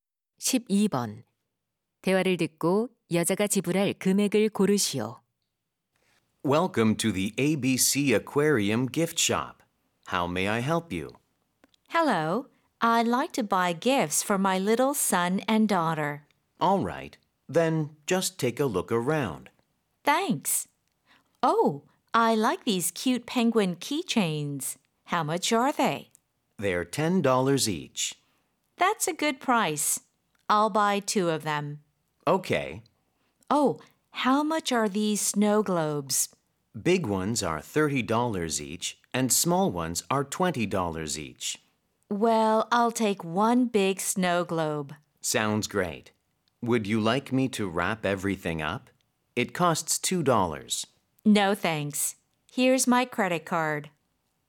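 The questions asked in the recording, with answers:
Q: 대화를 듣고 여자가 지불할 금액을 고르시오.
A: $50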